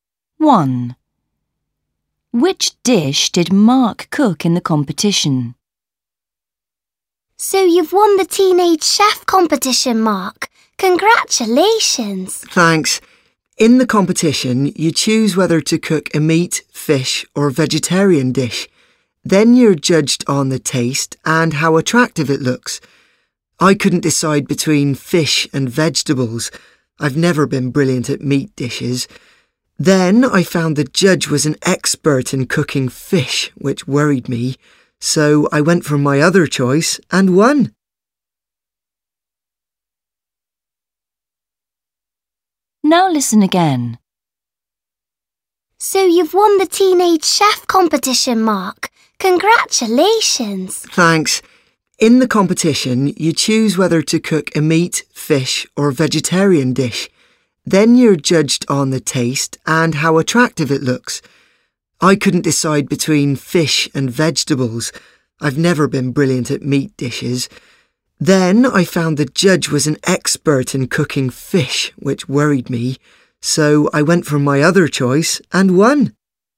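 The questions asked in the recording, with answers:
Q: Which dish did Mark cook in the competition?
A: A vegetarian dish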